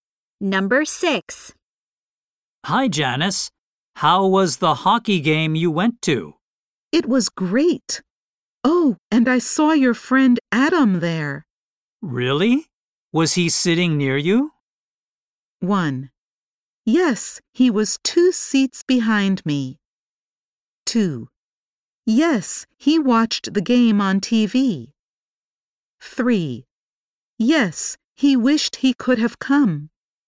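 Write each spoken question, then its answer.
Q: Really? Was he sitting near you?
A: 1: Yes, he was 2 seats behind me.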